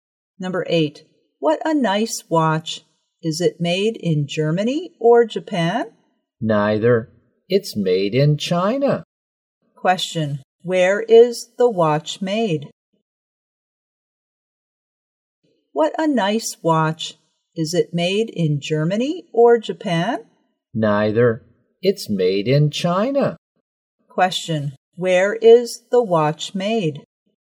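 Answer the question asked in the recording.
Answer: In China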